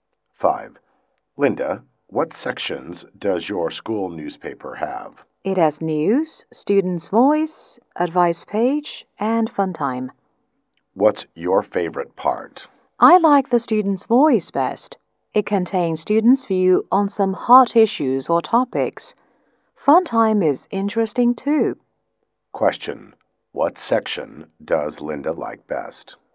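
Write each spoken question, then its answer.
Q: What section does Linda like best?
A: Students' voice.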